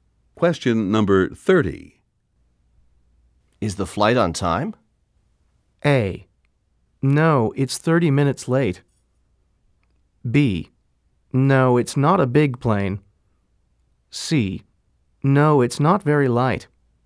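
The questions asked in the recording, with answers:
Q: Is the flight on time?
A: A: No, it's 30 minutes late.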